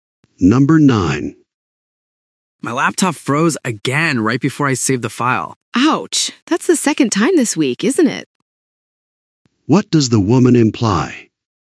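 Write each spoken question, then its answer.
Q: What does the woman imply?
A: The laptop keeps having problems.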